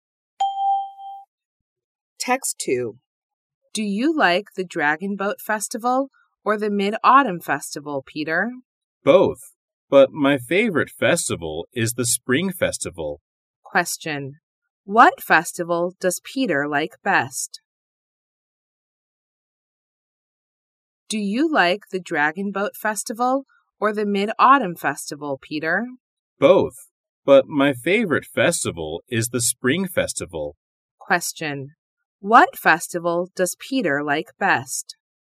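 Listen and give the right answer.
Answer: The Spring Festival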